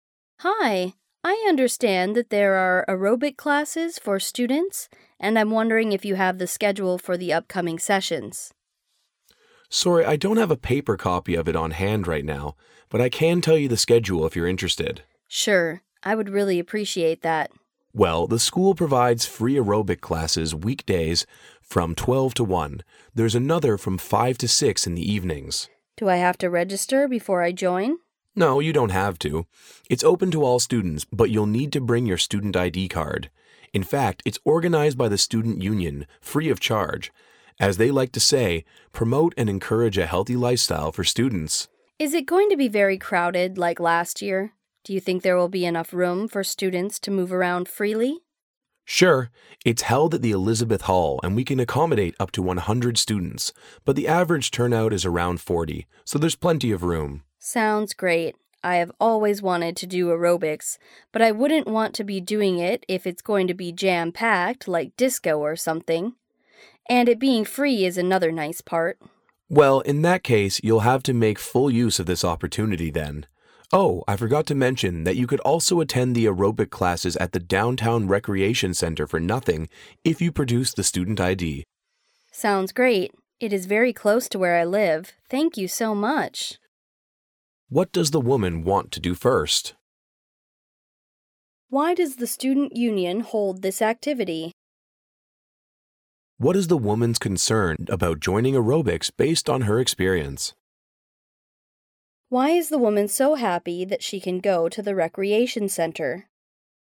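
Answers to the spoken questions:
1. Get the schedule for the aerobic classes
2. To promote and encourage a healthy lifestyle for students
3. That the class will be too crowded, like last year
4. It is very close to where she lives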